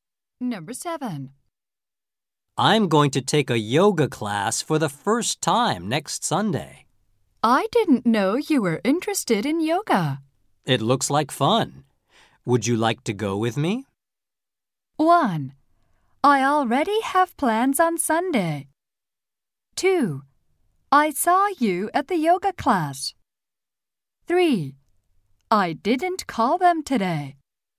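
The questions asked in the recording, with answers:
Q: It looks like fun. Would you like to go with me?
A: 1: I already have plans on Sunday.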